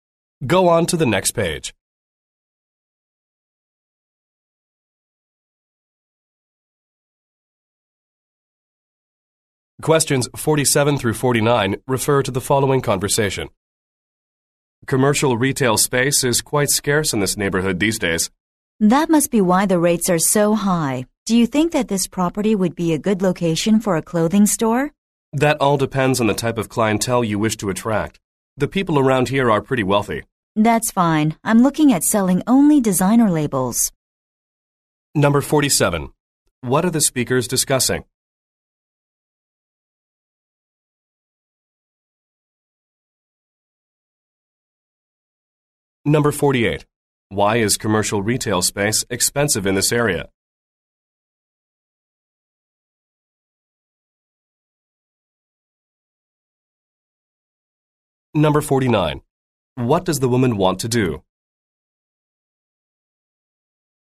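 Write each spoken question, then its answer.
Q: What are the speakers discussing?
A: A commercial retail property for a clothing store

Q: Why is commercial retail space expensive in this area?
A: It is scarce

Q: What does the woman want to do?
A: Open a clothing store selling designer labels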